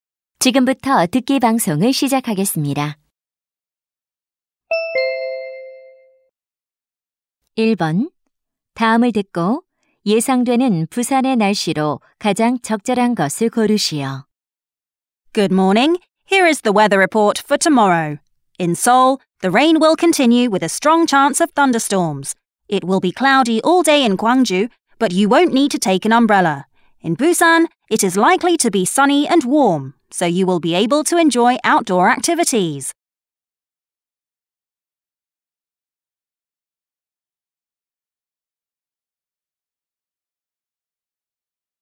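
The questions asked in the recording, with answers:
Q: 다음을 듣고 예상되는 부산의 날씨로 가장 적절한 것을 고르시오.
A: 맑고 따뜻함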